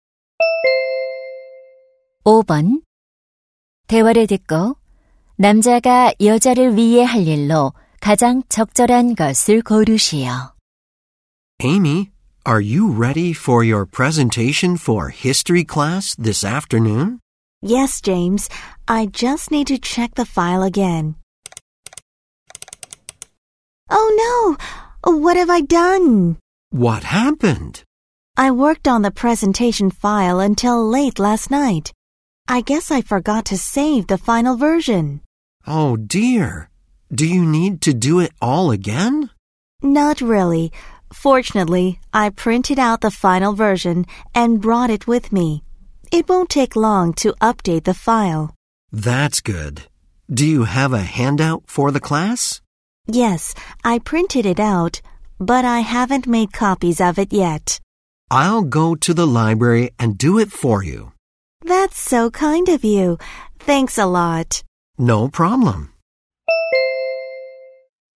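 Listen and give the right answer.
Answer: 유인물 복사하기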